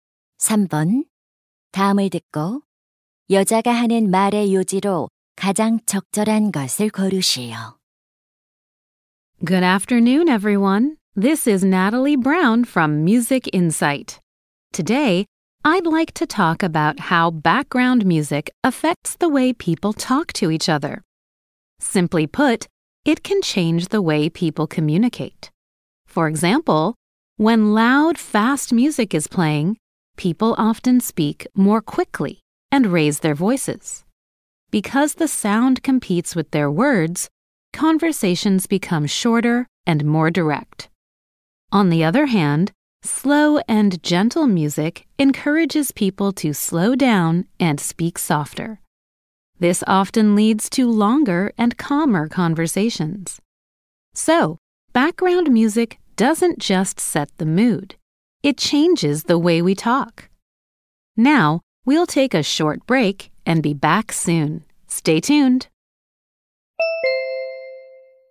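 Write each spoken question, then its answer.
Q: 다음을 듣고 여자가 하는 말의 요지로 가장 적절한 것을 고르시오.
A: 배경 음악은 사람들이 대화하는 방식에 영향을 준다.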